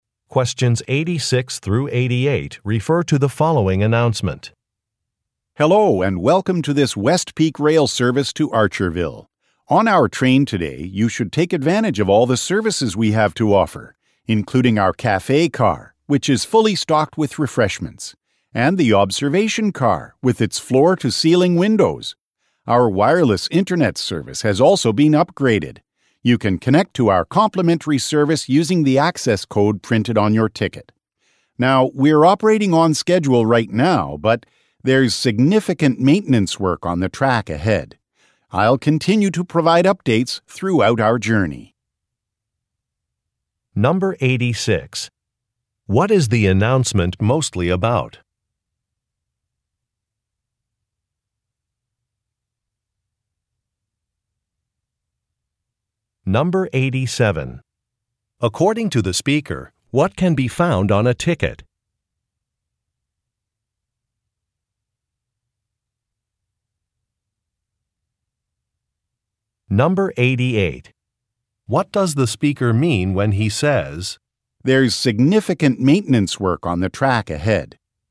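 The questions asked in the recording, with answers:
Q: What is the announcement mostly about?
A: Services on board the train

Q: According to the speaker, what can be found on a ticket?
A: An access code for the wireless internet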